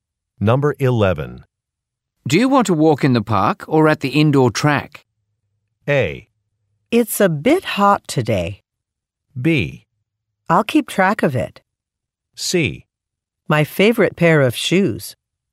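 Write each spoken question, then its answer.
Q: Do you want to walk in the park or at the indoor track?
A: A: It's a bit hot today.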